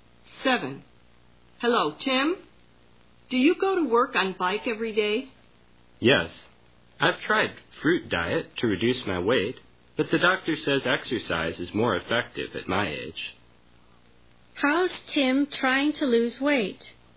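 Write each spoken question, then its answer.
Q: How's Tim trying to lose weight?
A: By riding a bike to work (exercise).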